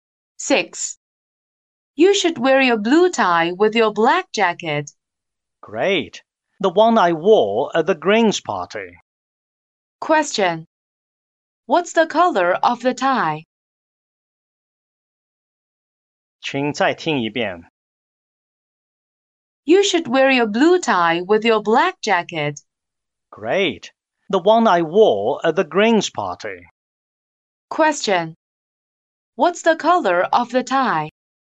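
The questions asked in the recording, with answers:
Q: What's the color of the tie?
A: Blue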